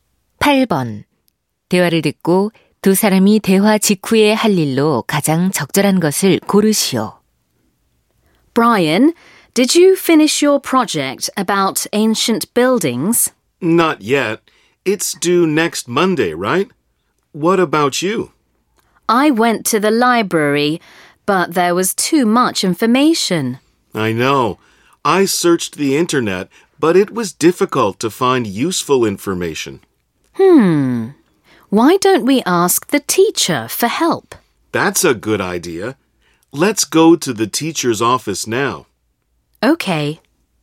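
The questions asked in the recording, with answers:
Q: 대화를 듣고 두 사람이 대화 직후에 할 일로 가장 적절한 것을 고르시오.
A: 선생님께 도움을 요청하러 교무실에 가기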